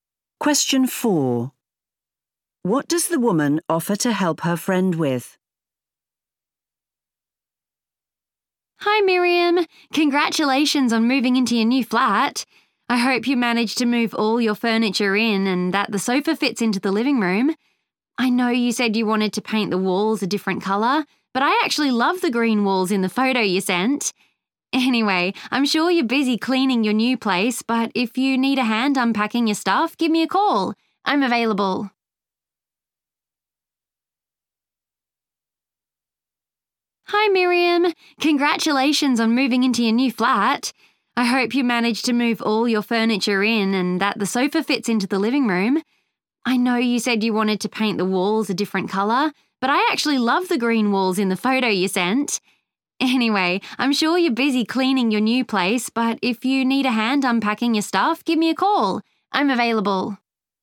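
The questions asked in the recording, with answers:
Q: What does the woman offer to help her friend with?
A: Unpacking her things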